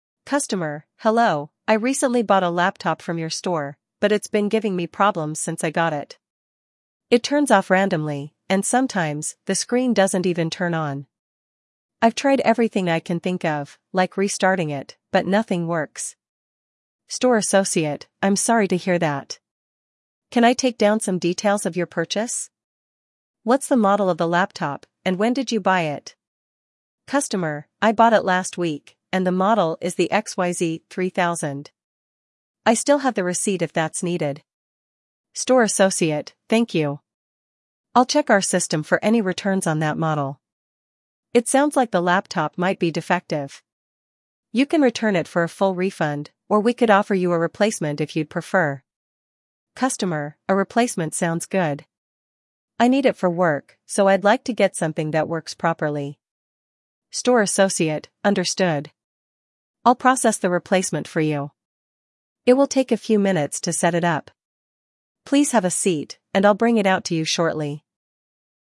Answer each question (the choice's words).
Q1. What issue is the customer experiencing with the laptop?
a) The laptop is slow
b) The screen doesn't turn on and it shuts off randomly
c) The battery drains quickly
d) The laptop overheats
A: The screen doesn't turn on and it shuts off randomly

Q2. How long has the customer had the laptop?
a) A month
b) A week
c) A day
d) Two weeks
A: A week

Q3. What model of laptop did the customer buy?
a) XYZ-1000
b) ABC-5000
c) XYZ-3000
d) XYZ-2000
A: XYZ-3000

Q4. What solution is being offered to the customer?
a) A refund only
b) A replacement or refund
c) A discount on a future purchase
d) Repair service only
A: A replacement or refund

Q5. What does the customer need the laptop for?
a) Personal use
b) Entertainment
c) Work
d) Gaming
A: Work

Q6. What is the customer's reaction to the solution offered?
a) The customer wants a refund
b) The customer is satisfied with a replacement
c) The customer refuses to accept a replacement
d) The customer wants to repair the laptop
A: The customer is satisfied with a replacement

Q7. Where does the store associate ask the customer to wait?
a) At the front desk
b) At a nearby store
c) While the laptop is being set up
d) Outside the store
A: While the laptop is being set up

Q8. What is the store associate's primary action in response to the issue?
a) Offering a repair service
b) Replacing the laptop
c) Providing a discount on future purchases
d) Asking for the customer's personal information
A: Replacing the laptop

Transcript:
Customer: "Hello, I recently bought a laptop from your store, but it's been giving me problems since I got it. It turns off randomly, and sometimes, the screen doesn't even turn on. I've tried everything I can think of, like restarting it, but nothing works."
Store Associate: "I'm sorry to hear that. Can I take down some details of your purchase? What's the model of the laptop, and when did you buy it?"
Customer: "I bought it last week, and the model is the XYZ-3000. I still have the receipt if that's needed."
Store Associate: "Thank you. I'll check our system for any returns on that model. It sounds like the laptop might be defective. You can return it for a full refund, or we could offer you a replacement if you'd prefer."
Customer: "A replacement sounds good. I need it for work, so I'd like to get something that works properly."
Store Associate: "Understood. I'll process the replacement for you. It will take a few minutes to set it up. Please have a seat, and I'll bring it out to you shortly."